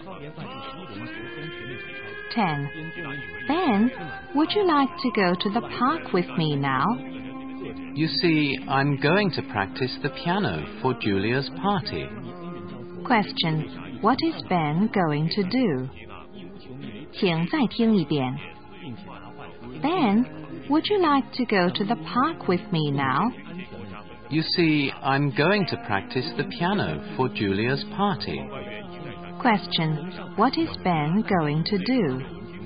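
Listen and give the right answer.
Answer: Practice the piano for Julia's party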